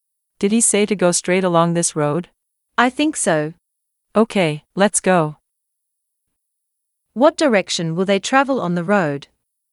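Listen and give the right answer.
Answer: Straight along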